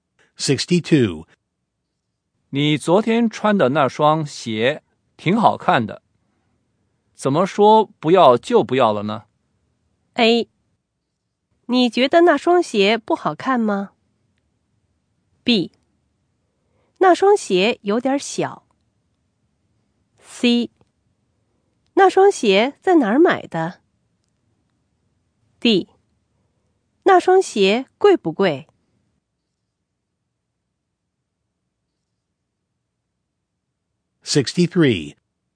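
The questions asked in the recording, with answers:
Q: 你昨天穿的那双鞋挺好看的。怎么说不要就不要了呢?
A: B: 那双鞋有点小。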